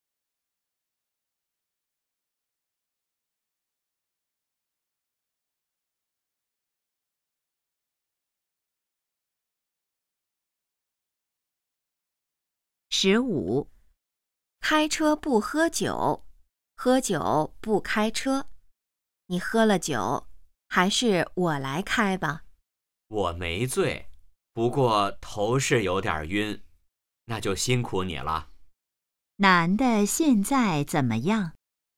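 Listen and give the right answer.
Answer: 头有点晕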